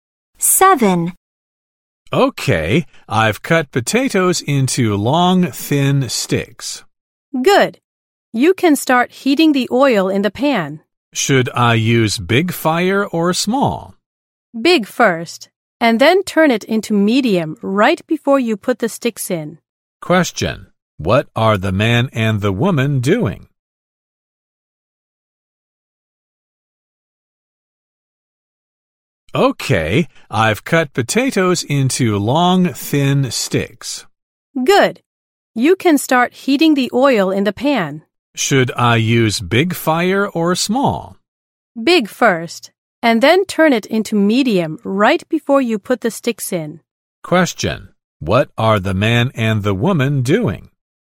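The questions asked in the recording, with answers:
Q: Question: What are the man and the woman doing?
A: Making French fries.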